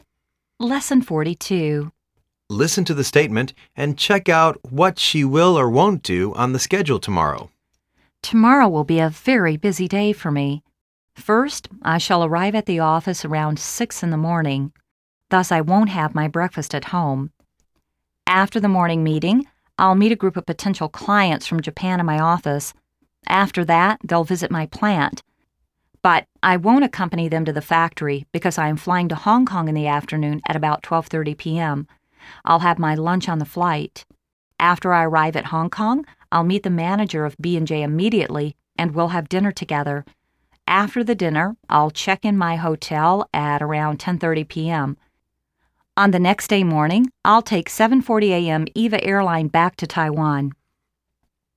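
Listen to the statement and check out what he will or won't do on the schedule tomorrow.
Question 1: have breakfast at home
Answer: won't

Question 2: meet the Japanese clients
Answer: will

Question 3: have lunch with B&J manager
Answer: won't

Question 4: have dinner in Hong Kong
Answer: will

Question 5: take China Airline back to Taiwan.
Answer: won't

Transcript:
Listen to the statement and check out whats he will or won't do on the schedule tomorrow.
Tomorrow will be a very busy day for me. First, I shall arrive at the office around 6:00 in the morning. Thus, I won't have my breakfast at home. After the morning meeting, l'II meet a group of potential clients from Japan in my office. After that,they'II visit my plant. But, I won't accompany them to the factory because I am flying to Hong Kong in the afternoon at about 12:30pm. I'II have my lunch on the flight. After I arrive at Hong Kong, l'II meet the manager of B&J immediately and we'II have dinner together. 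After the dinner, l'II check in my hotel at around 10:30 pm.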